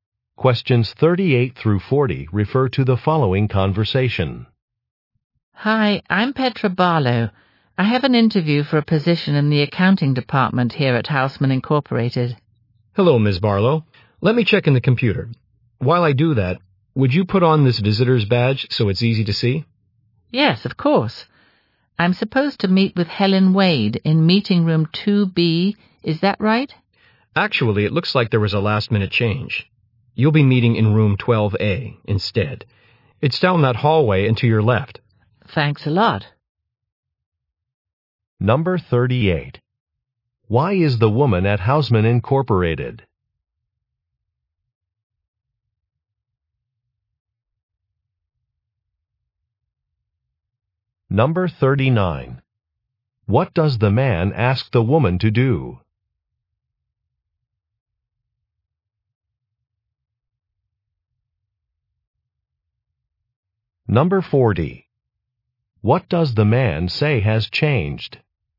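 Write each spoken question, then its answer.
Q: Why is the woman at Houseman Incorporated?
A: For a job interview

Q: What does the man ask the woman to do?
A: Wear a visitor's badge

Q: What does the man say has changed?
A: The meeting room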